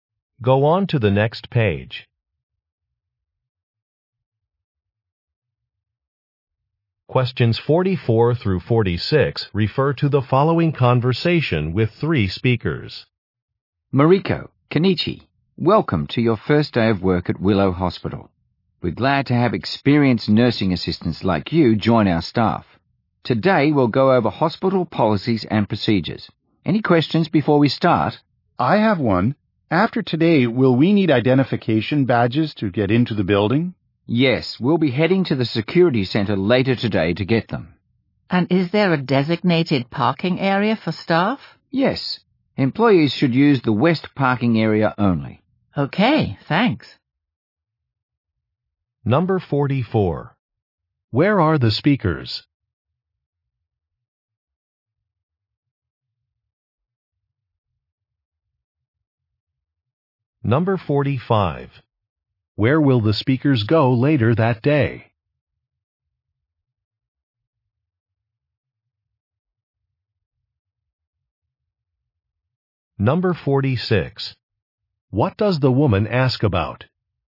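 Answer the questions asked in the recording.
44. At a hospital
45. To the security center
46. A staff parking area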